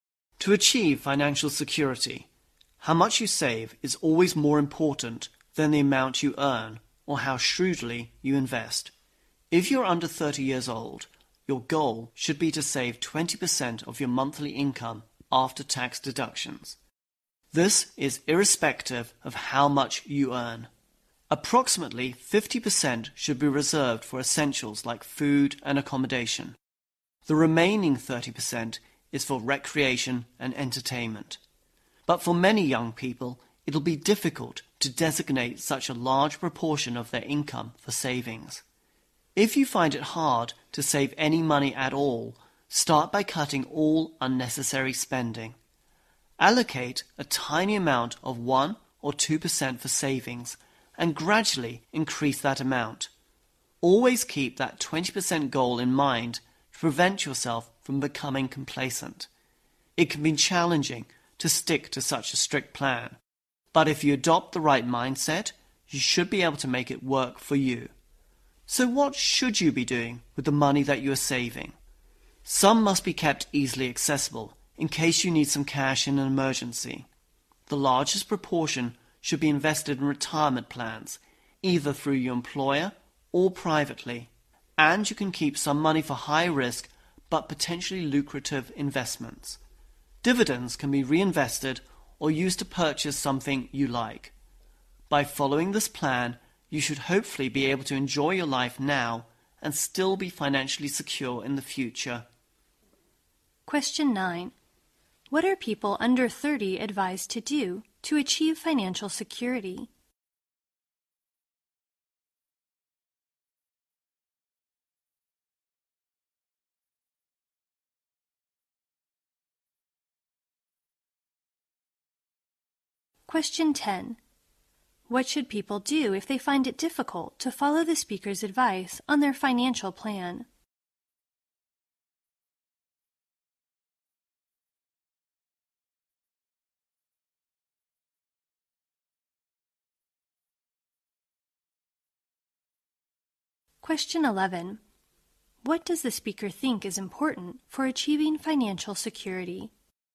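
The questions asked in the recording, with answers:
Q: What are people under 30 advised to do to achieve financial security?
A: Save 20% of their monthly after-tax income

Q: What should people do if they find it difficult to follow the speaker's advice on their financial plan?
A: Cut all unnecessary spending and start by saving 1 or 2%, then gradually increase it

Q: What does the speaker think is important for achieving financial security?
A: How much you save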